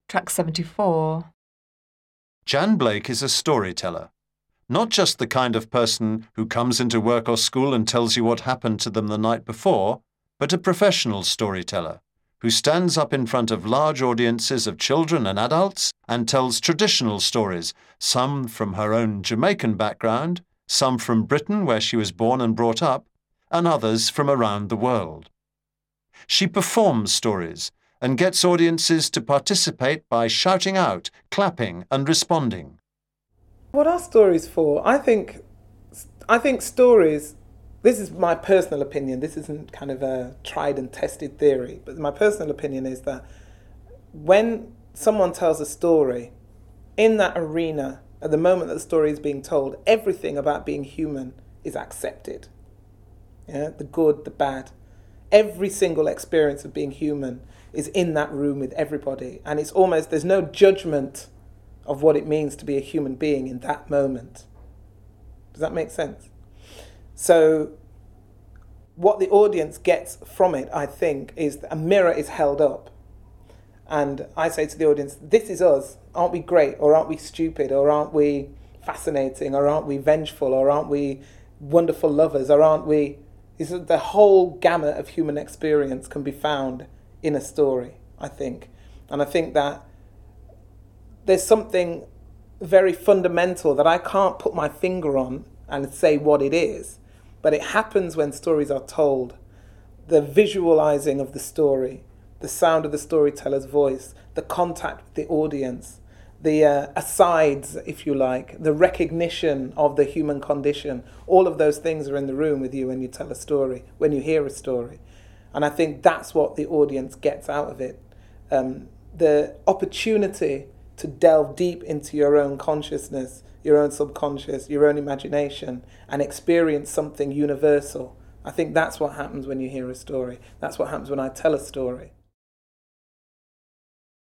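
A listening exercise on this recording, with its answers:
You have 30 seconds to read the task. Then listen to Jan Blake talking about importance of stories and tick off the correct answer.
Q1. Jan tells stories for a living.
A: true

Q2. She moved to Britain at a young age.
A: false

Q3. She is often booed by audiences.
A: false

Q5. Jan's performances make you feel the whole gamut of human experience.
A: true

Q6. Stories are like mirrors that make us feel better about ourselves.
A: false

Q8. Stories offer a universal approach to escaping your own consciousness.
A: false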